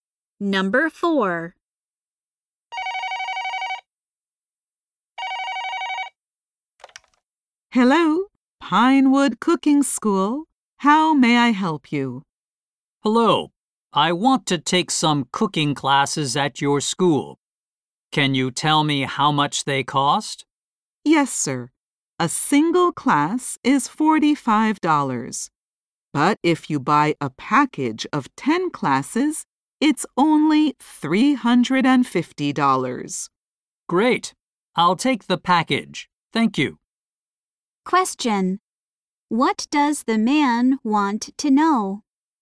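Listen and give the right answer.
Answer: How much the cooking classes cost.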